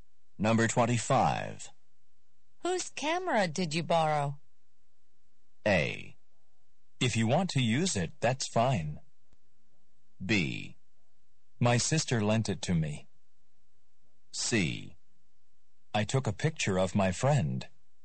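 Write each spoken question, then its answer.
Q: Whose camera did you borrow?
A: B: My sister lent it to me.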